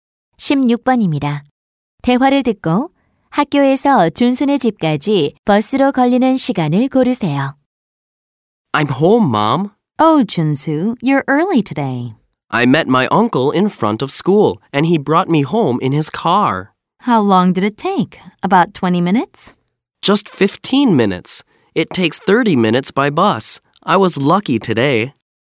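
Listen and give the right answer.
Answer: 30분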